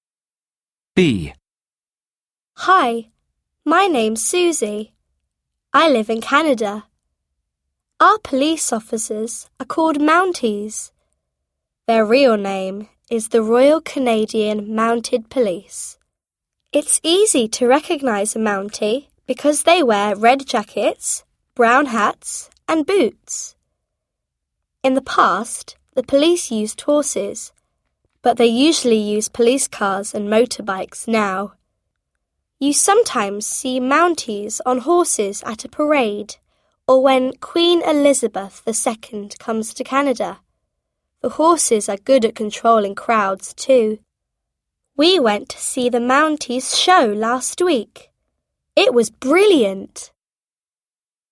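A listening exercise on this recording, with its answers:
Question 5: Where does Suzy live?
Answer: She lives in Canada.

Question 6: Who is a Mounty?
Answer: He's a police.

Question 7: What does a Mounty wear?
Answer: He wears red jacket, brown hat and long boots.

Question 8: When can you see the Mounty ride on horse?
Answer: He rides on horse when Queen Elizabeth II comes to Canada.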